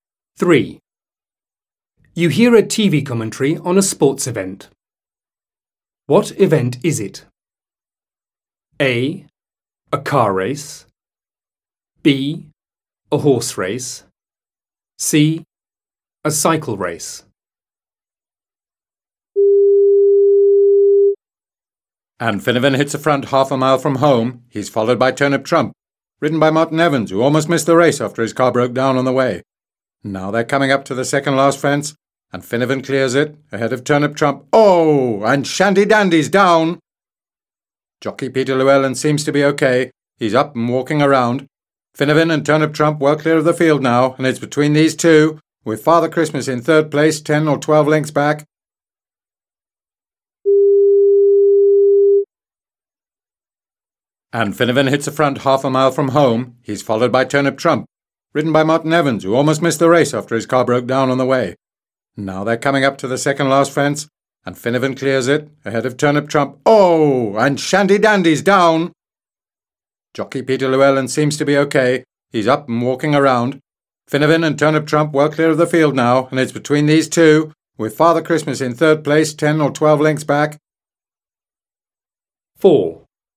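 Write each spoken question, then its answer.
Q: What event is it?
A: B: A horse race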